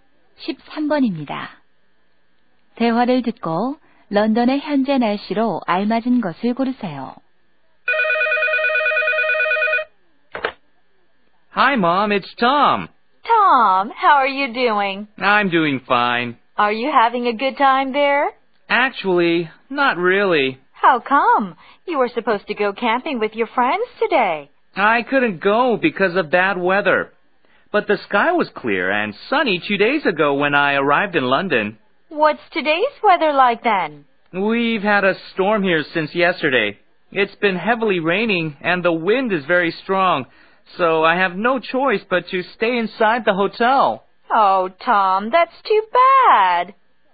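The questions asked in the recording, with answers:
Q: 대화를 듣고 런던의 현재 날씨로 알맞은 것을 고르세요.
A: 폭풍우(비가 많이 오고 바람이 강함)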